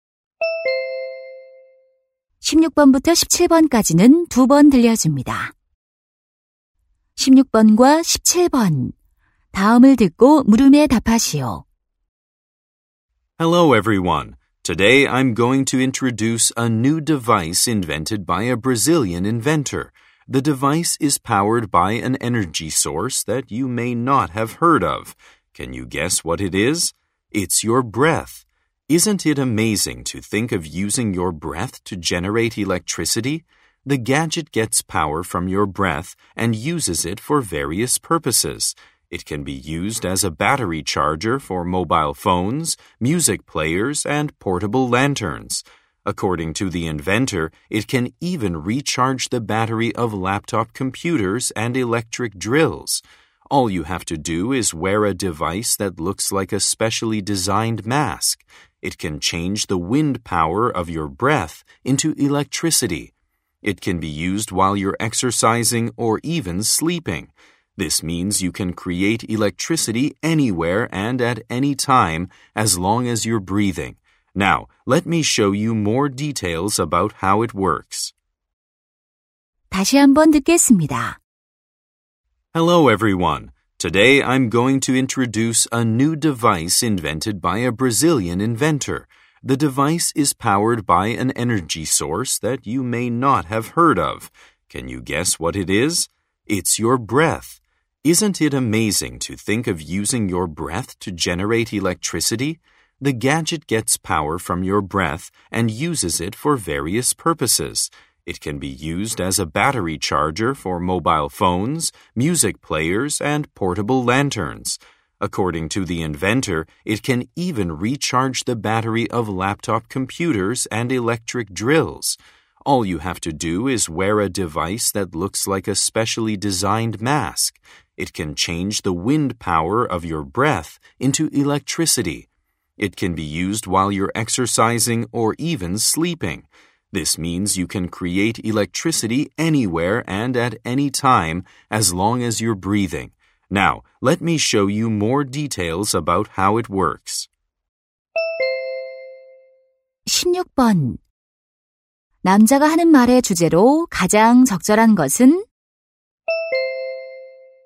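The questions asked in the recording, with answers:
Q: 남자가 하는 말의 주제로 가장 적절한 것은?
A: 숨(호흡)으로 전기를 만드는 새로운 기기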